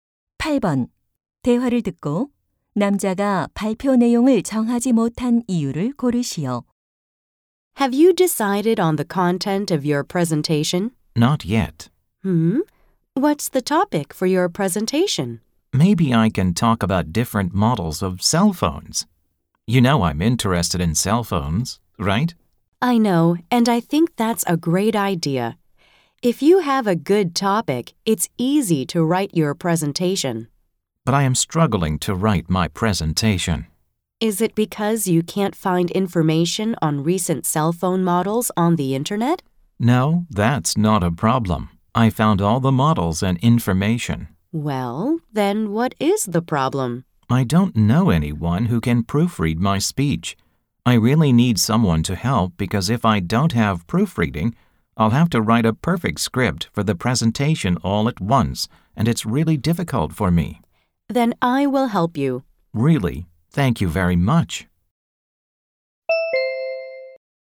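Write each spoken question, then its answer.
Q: 대화를 듣고 남자가 발표 내용을 정하지 못한 이유를 고르시오.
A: 원고를 교정해 줄 사람이 없어서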